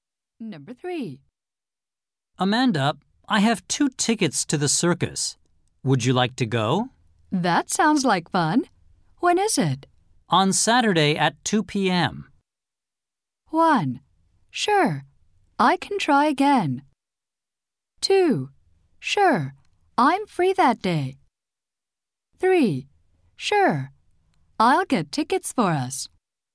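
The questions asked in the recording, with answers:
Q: On Saturday at 2 p.m.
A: 2: Sure, I'm free that day.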